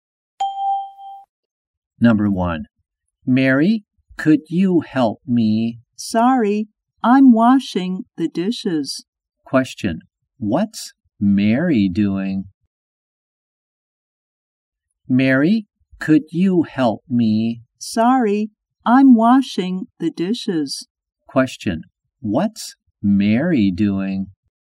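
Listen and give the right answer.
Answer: Washing the dishes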